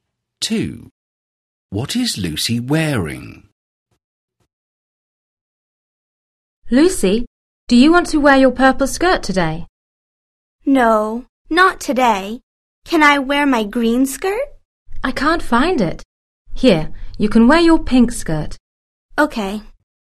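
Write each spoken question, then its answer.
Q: What is Lucy wearing?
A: Her pink skirt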